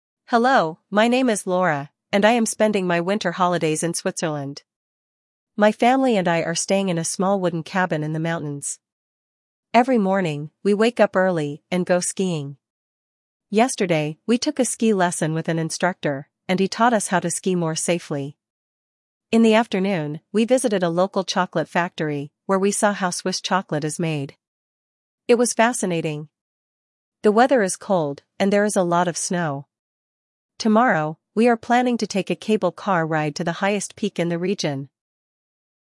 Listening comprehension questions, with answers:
1. Прослушайте текст и определите, какие из приведённых утверждений A–E соответствуют содержанию текста (1 – Right), какие не соответствуют (2 – False). Вы услышите текст дважды.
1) Laura is spending her holidays at the beach.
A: False

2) She is staying in a wooden cabin in the mountains.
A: Right

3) Yesterday, she went ice skating.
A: False

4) She visited a Swiss chocolate factory.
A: Right

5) Tomorrow, she will take a cable car ride.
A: Right

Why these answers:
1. She is in the mountains, not at the beach.
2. She is staying in a wooden cabin in the mountains.
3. She took a ski lesson, not ice skating.
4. She visited a Swiss chocolate factory.
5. She will take a cable car ride tomorrow.

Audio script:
Hello, my name is Laura, and I am spending my winter holidays in Switzerland. My family and I are staying in a small wooden cabin in the mountains. Every morning, we wake up early and go skiing. Yesterday, we took a ski lesson with an instructor, and he taught us how to ski more safely. In the afternoon, we visited a local chocolate factory, where we saw how Swiss chocolate is made. It was fascinating! The weather is cold, and there is a lot of snow. Tomorrow, we are planning to take a cable car ride to the highest peak in the region!

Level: 6 класс